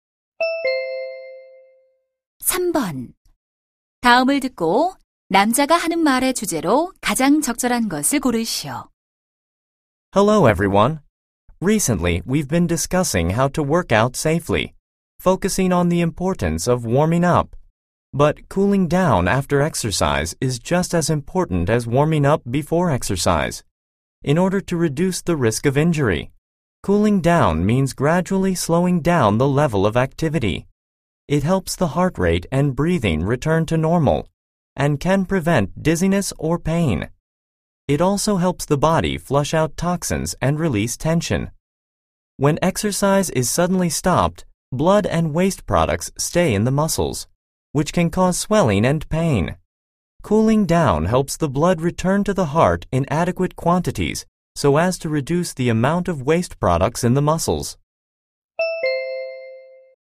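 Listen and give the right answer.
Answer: 운동 후 정리 운동의 중요성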